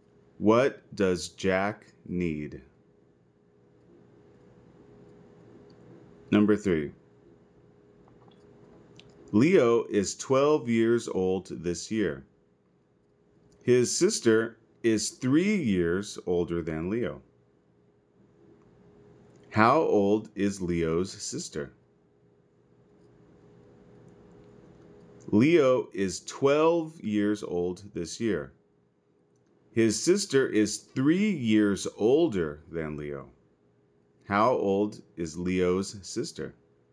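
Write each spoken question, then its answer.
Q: How old is Leo's sister?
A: 15 years old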